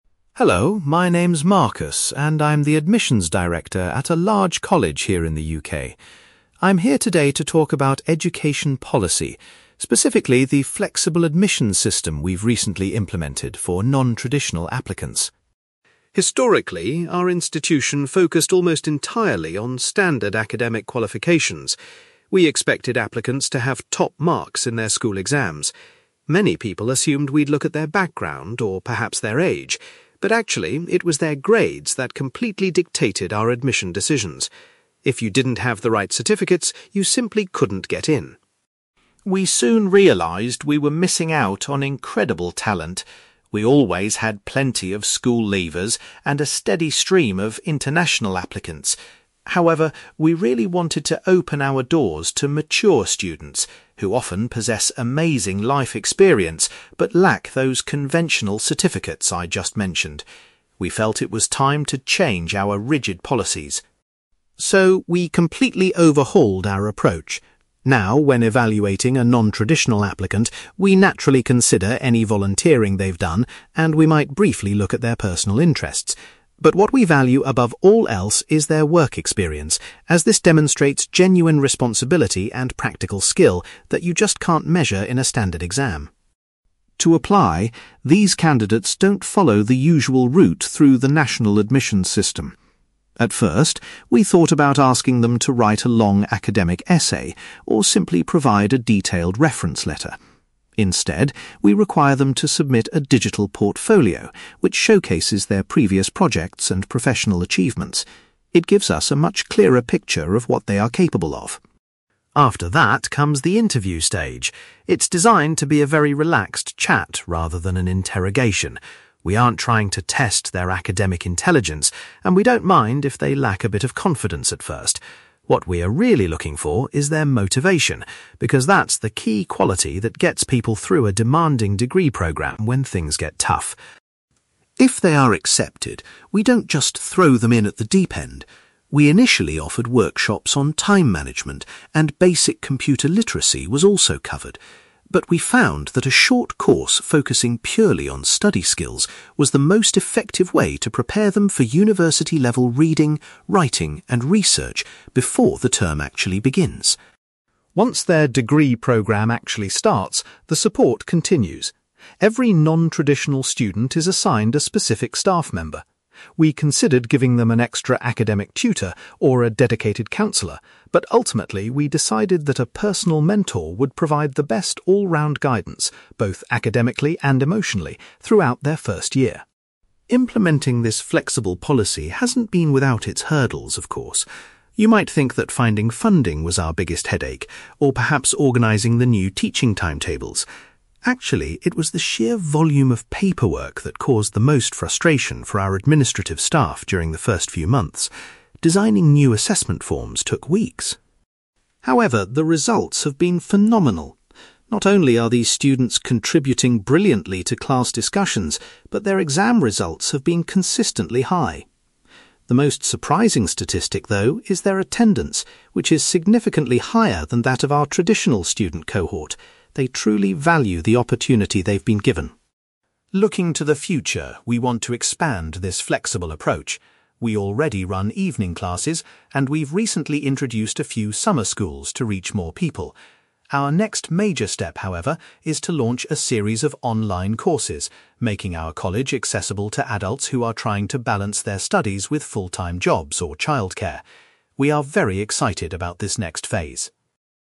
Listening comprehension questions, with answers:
For questions 9-18, complete the sentences with a word or short phrase.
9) Marcus explains that in the past, applicants' (9)........................... were the sole factor in deciding if they were accepted.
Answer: grades

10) The college specifically wanted to encourage (10)........................... to apply to their institution.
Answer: mature students

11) When assessing non-traditional applicants, the admissions team places the highest value on their (11)........................... .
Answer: work experience

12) Instead of a traditional application, candidates are asked to provide a (12)........................... displaying their past achievements.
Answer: digital portfolio

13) During the interview, the main quality Marcus looks for is the candidate's (13)........................... .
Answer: motivation

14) Accepted students take a preparatory course that helps them develop their (14)........................... before starting their degree.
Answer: study skills

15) To provide ongoing support, the college pairs each non-traditional learner with a (15)........................... .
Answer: personal mentor

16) Marcus admits that dealing with the increased (16)........................... was the most frustrating challenge for the staff initially.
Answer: paperwork

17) Marcus notes that the (17)........................... of non-traditional students has been surprisingly higher than average.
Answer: attendance

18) The college intends to develop (18)........................... in the future to help students who have busy schedules.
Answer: online courses

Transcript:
Marcus: Hello, my name's Marcus, and I'm the Admissions Director at a large college here in the UK. I'm here today to talk about education policy, specifically the flexible admissions system we've recently implemented for non-traditional applicants.
Historically, our institution focused almost entirely on standard academic qualifications. We expected applicants to have top marks in their school exams. Many people assumed we'd look at their background, or perhaps their age, but actually, it was their grades that completely dictated our admission decisions. If you didn't have the right certificates, you simply couldn't get in.
We soon realised we were missing out on incredible talent. We always had plenty of school leavers, and a steady stream of international applicants. However, we really wanted to open our doors to mature students, who often possess amazing life experience but lack those conventional certificates I just mentioned. We felt it was time to change our rigid policies.
So, we completely overhauled our approach. Now, when evaluating a non-traditional applicant, we naturally consider any volunteering they've done, and we might briefly look at their personal interests. But what we value above all else is their work experience, as this demonstrates genuine responsibility and practical skill that you just can't measure in a standard exam.
To apply, these candidates don't follow the usual route through the national admissions system. At first, we thought about asking them to write a long academic essay, or simply provide a detailed reference letter. Instead, we require them to submit a digital portfolio which showcases their previous projects and professional achievements. It gives us a much clearer picture of what they are capable of.
After that comes the interview stage. It's designed to be a very relaxed chat rather than an interrogation. We aren't trying to test their academic intelligence, and we don't mind if they lack a bit of confidence at first. What we are really looking for is their motivation, because that's the key quality that gets people through a demanding degree programme when things get tough.
If they are accepted, we don't just throw them in at the deep end. We initially offered workshops on time management, and basic computer literacy was also covered. But we found that a short course focusing purely on study skills was the most effective way to prepare them for university-level reading, writing, and research before the term actually begins.
Once their degree programme actually starts, the support continues. Every non-traditional student is assigned a specific staff member. We considered giving them an extra academic tutor, or a dedicated counsellor, but ultimately we decided that a personal mentor would provide the best all-round guidance, both academically and emotionally, throughout their first year.
Implementing this flexible policy hasn't been without its hurdles, of course. You might think that finding funding was our biggest headache, or perhaps organising the new teaching timetables. Actually, it was the sheer volume of paperwork that caused the most frustration for our administrative staff during the first few months. Designing new assessment forms took weeks!
However, the results have been phenomenal. Not only are these students contributing brilliantly to class discussions, but their exam results have been consistently high. The most surprising statistic, though, is their attendance, which is significantly higher than that of our traditional student cohort. They truly value the opportunity they've been given.
Looking to the future, we want to expand this flexible approach. We already run evening classes, and we've recently introduced a few summer schools to reach more people. Our next major step, however, is to launch a series of online courses, making our college accessible to adults who are trying to balance their studies with full-time jobs or childcare. We are very excited about this next phase.

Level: B2